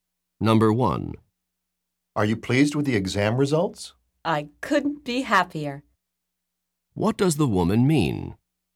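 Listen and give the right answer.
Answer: She is extremely pleased with the exam results.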